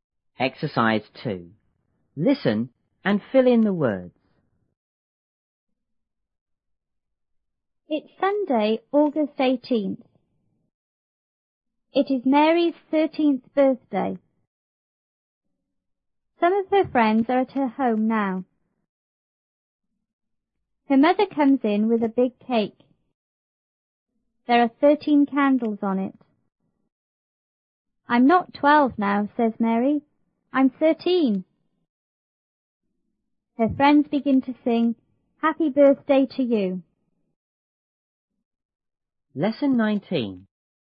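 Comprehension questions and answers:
2.Listen and fill in the words.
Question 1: It's ___ ,___ 18th. It is Mary's ___ birthday.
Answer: Sunday, August, 13th

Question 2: Some of her ___ are at her home now.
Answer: friends

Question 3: Her mother comes in _ a big cake.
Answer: with

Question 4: There are _ candles on it.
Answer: 13

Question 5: 'I'm not ___ now,'says Mary,'I'm thirteen!'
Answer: 12

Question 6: Her friend ___ to sing,'___ ___ to you.'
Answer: begin, Happy Birthday

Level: 初中英语广州版1B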